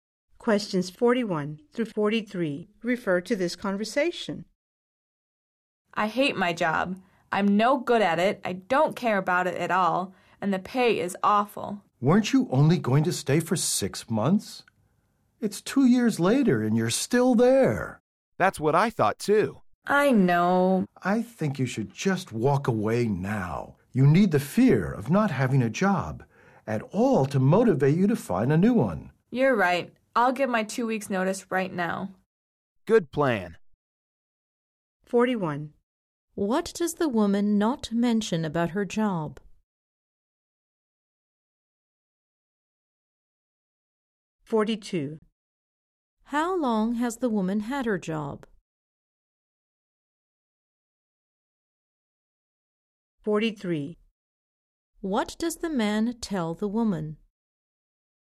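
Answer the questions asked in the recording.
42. 2 years
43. To quit her job now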